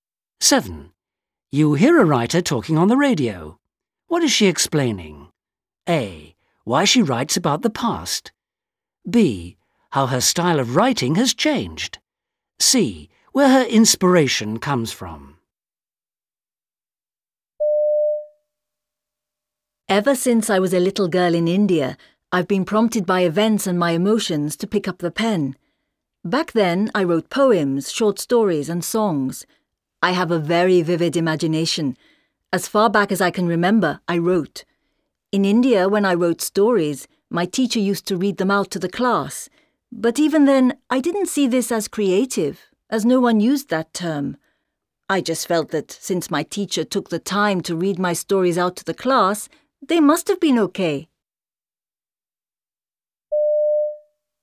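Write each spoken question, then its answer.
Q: What is she explaining?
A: C: Where her inspiration comes from.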